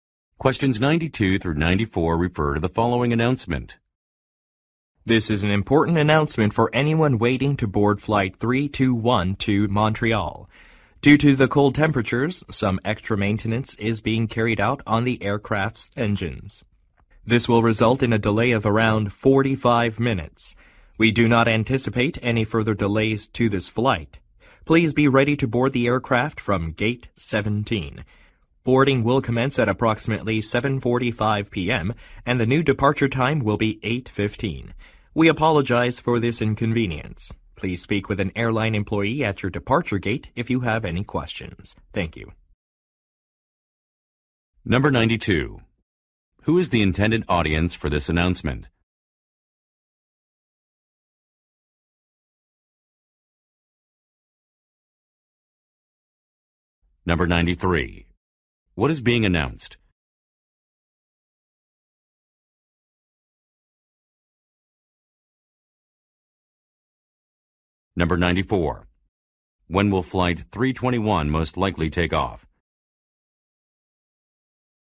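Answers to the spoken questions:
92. Passengers waiting for flight 321 to Montreal
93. A delay of about 45 minutes
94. At 8:15 p.m.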